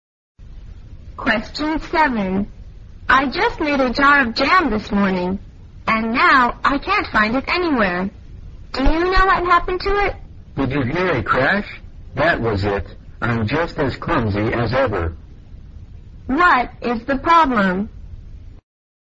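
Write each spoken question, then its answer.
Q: What is the problem?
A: The jar of jam was dropped and broken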